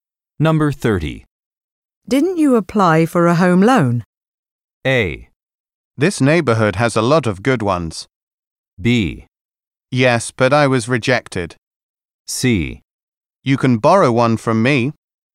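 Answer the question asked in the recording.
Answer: B: Yes, but I was rejected.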